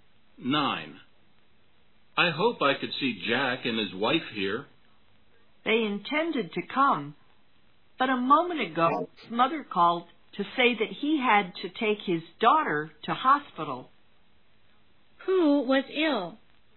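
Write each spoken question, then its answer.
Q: Who was ill?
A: Jack's daughter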